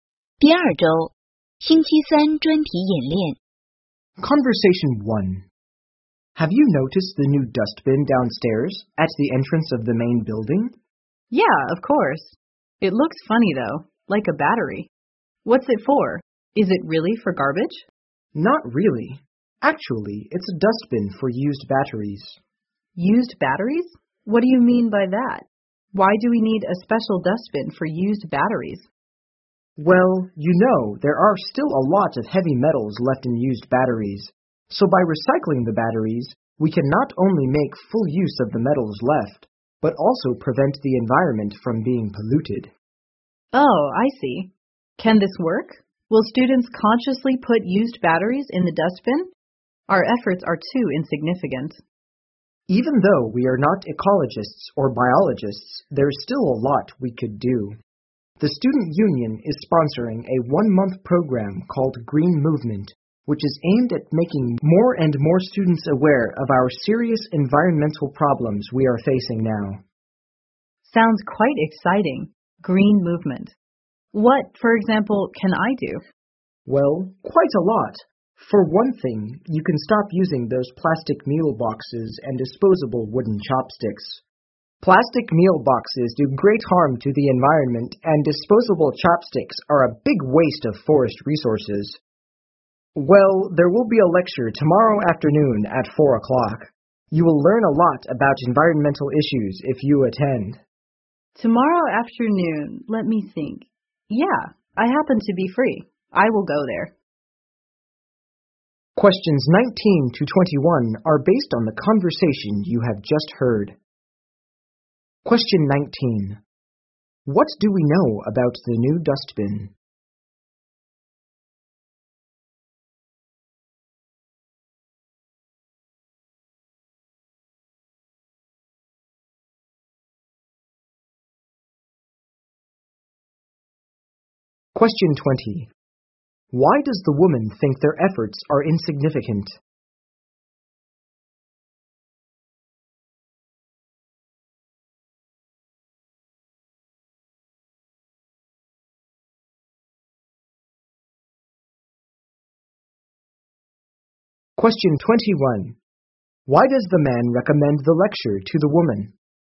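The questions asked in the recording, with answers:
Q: What do we know about the new dustbin?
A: It is for collecting used batteries.

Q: Why does the man recommend the lecture to the woman?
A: She can learn a lot about environmental issues there.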